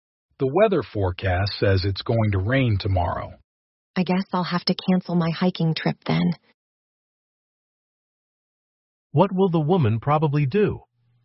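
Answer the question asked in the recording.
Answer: Cancel her hiking trip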